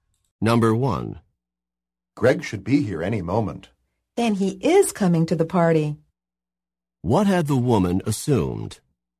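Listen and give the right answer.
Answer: That Greg was not coming to the party.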